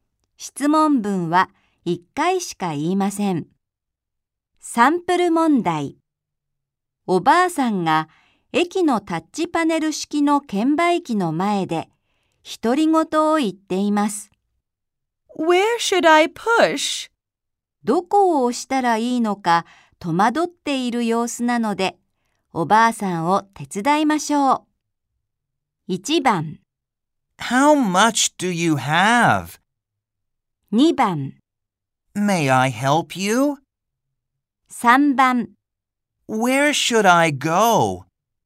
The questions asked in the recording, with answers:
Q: 正しく質問していると思う文の番号を1つ選びましょう。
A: 2番が答えだとわかります。